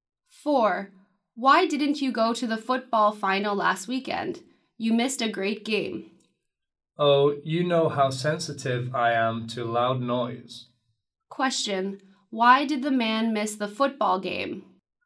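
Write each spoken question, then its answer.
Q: Question, why did the man miss the football game?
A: He is sensitive to loud noise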